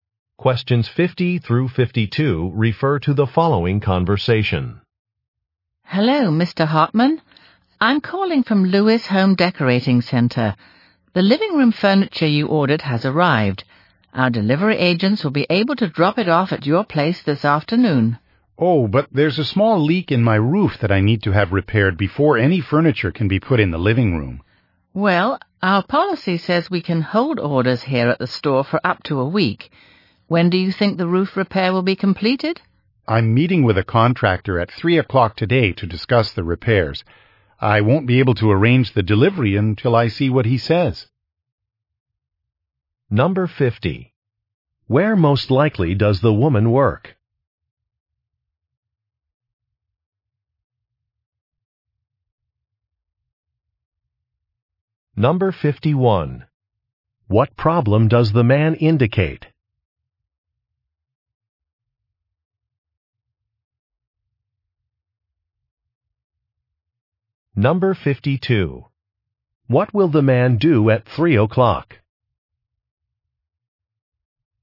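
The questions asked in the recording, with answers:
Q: Where most likely does the woman work?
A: At a home decorating store

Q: What problem does the man indicate?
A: His roof has a leak

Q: What will the man do at 3 o'clock?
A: Meet with a contractor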